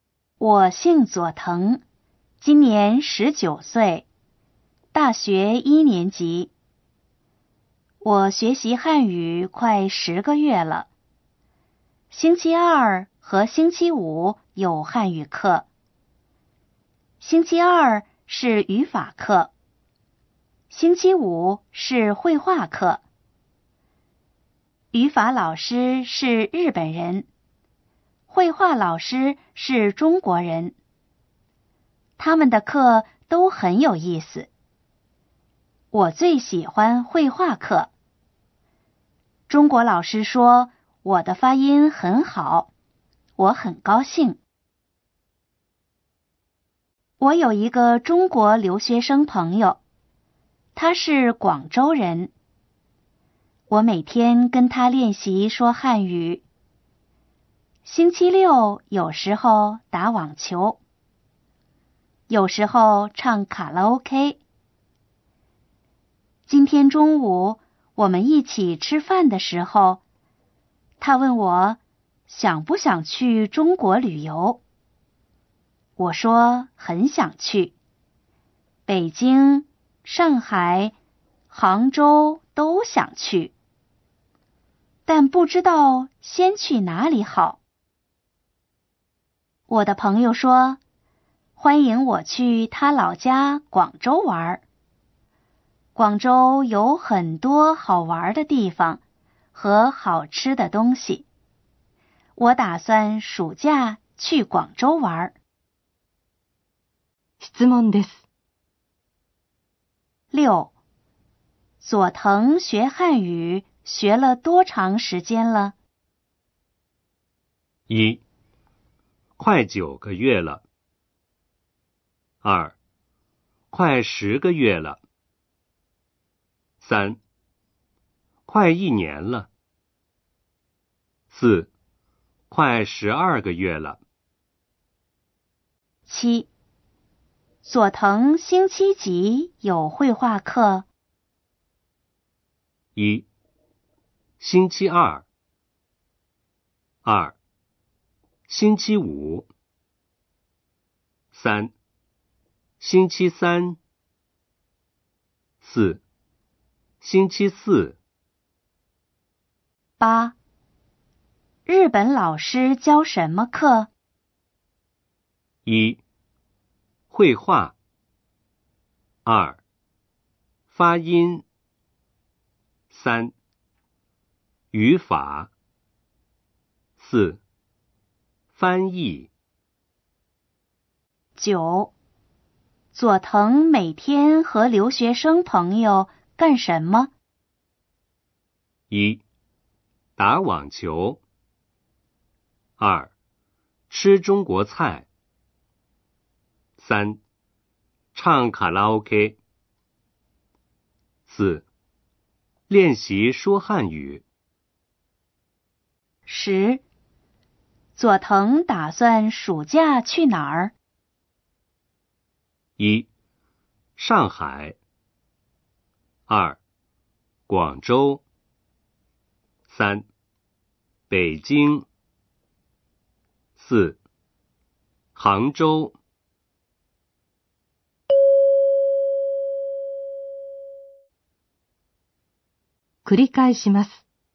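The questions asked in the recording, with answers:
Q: 佐藤学汉语学了多长时间了?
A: 2: 快十个月了。

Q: 佐藤星期几有绘画课?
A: 2: 星期五。

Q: 日本老师教什么课?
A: 3: 语法。

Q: 佐藤每天和留学生朋友干什么?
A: 4: 练习说汉语。

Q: 佐藤打算暑假去哪儿?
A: 2: 广州。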